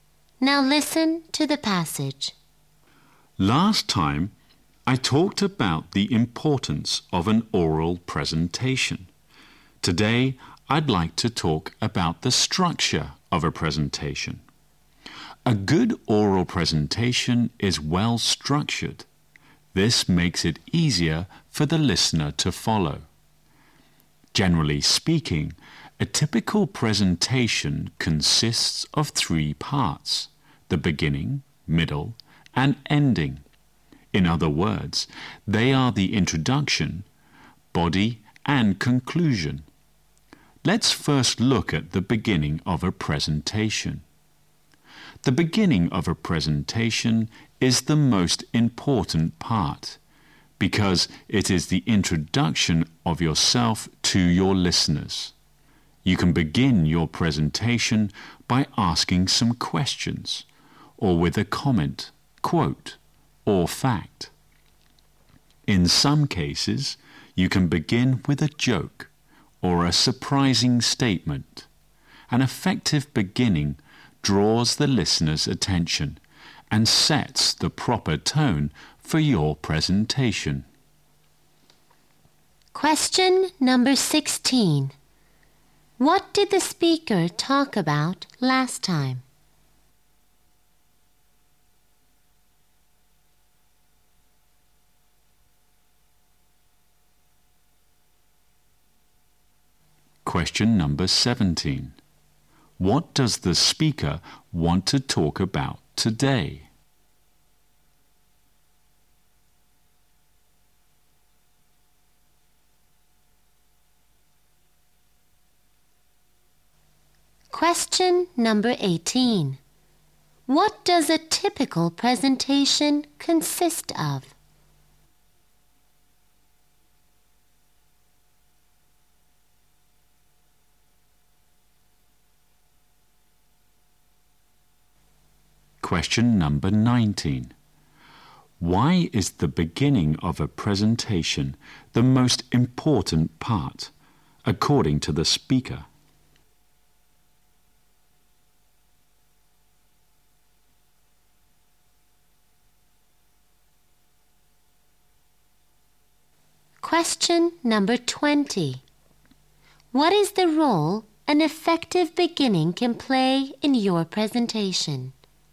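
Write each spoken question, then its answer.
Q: What did the speaker talk about last time?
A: The importance of an oral presentation

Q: What does the speaker want to talk about today?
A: The structure of a presentation

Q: What does a typical presentation consist of?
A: Three parts: beginning, middle and ending

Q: Why is the beginning of a presentation the most important part, according to the speaker?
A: It introduces you to your listeners

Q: What is the role an effective beginning can play in your presentation?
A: It draws the listener's attention and sets the proper tone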